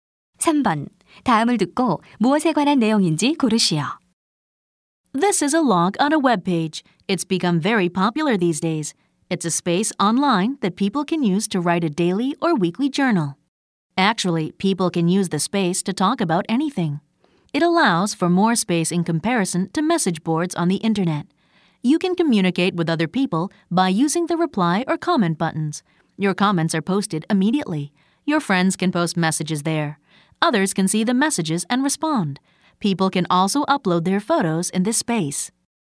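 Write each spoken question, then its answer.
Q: 다음을 듣고 무엇에 관한 내용인지 고르시오.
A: 블로그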